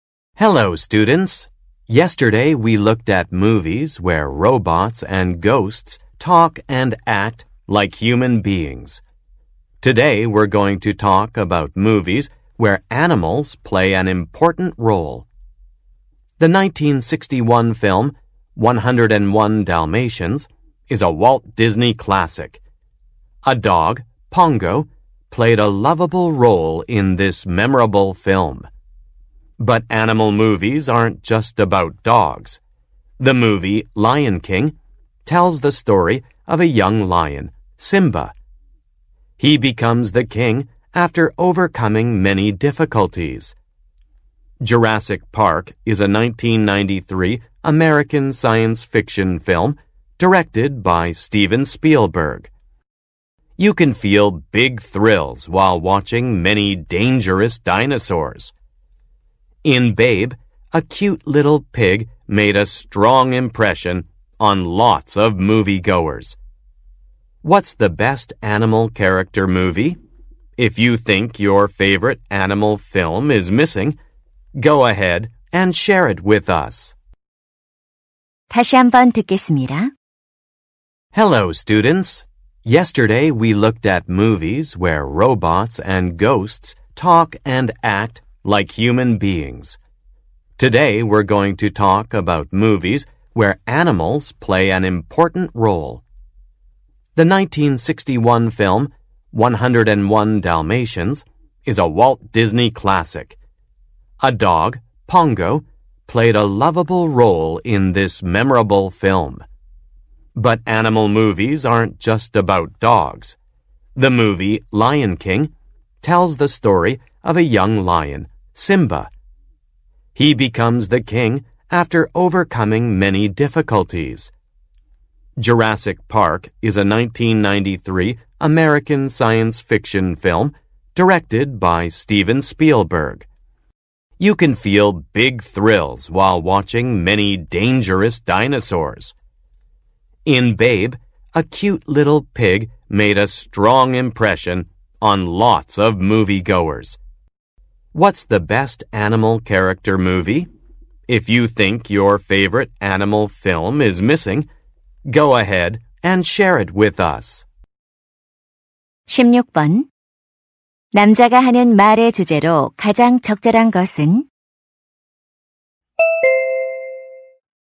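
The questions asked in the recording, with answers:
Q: 남자가 하는 말의 주제로 가장 적절한 것은?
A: 동물이 중요한 역할을 하는 영화들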